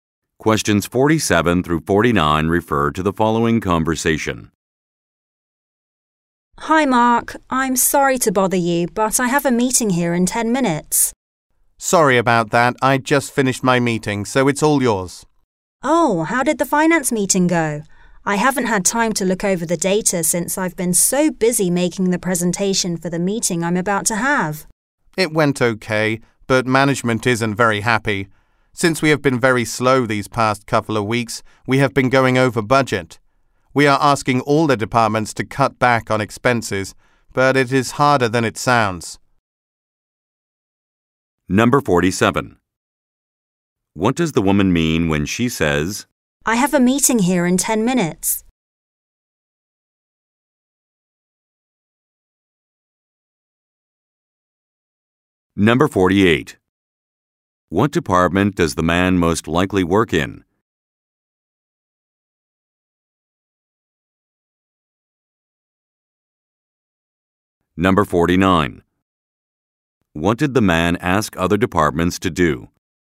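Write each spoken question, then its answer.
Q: What department does the man most likely work in?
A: Finance

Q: What did the man ask other departments to do?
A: Cut back on expenses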